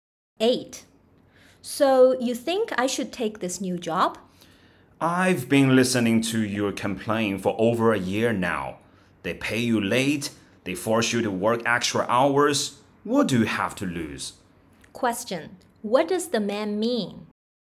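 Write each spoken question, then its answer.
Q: What does the man mean?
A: She should take the new job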